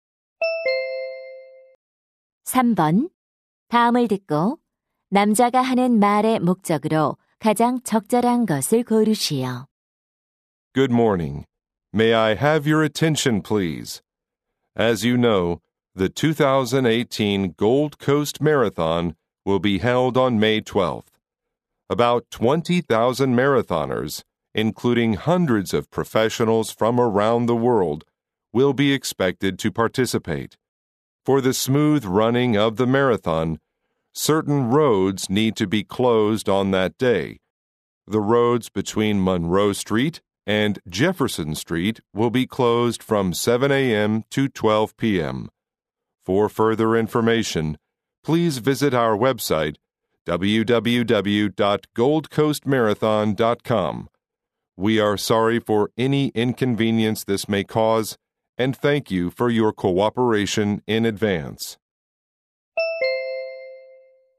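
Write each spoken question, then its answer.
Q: 다음을 듣고 남자가 하는 말의 목적으로 가장 적절한 것을 고르시오.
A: 마라톤 대회 당일의 도로 통제를 안내하려고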